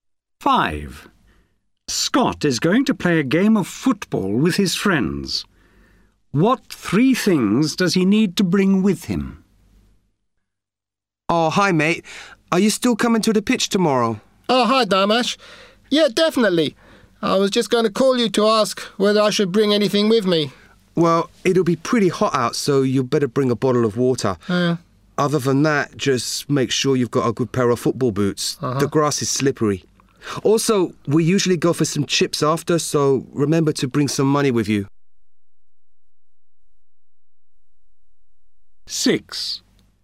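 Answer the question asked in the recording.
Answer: A bottle of water, football boots and money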